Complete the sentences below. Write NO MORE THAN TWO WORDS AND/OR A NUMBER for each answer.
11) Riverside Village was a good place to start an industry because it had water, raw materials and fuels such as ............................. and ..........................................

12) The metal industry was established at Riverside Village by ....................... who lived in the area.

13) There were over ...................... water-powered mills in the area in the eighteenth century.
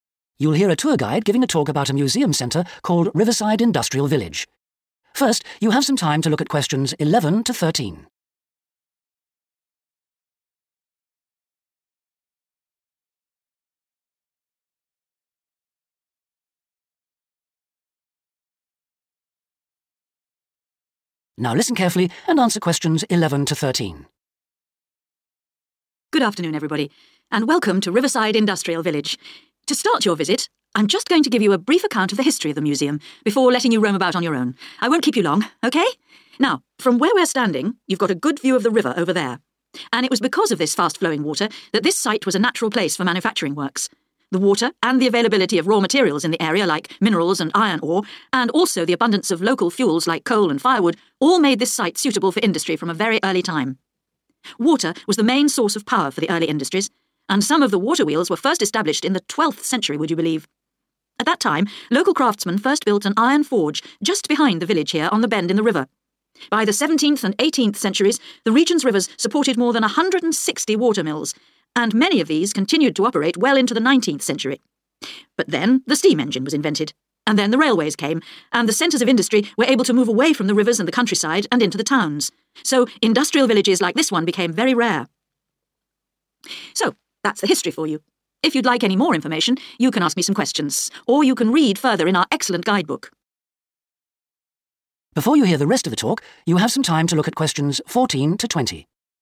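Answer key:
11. coal, firewood
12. local craftsmen
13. 160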